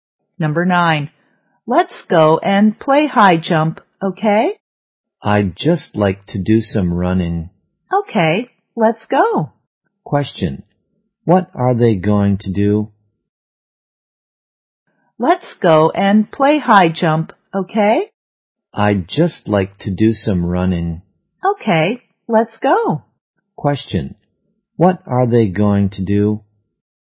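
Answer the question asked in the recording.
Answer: Do some running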